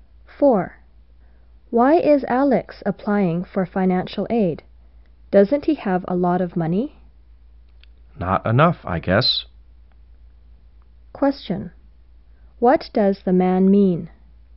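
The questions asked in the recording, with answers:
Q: Question. What does the man mean?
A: Alex doesn't have enough money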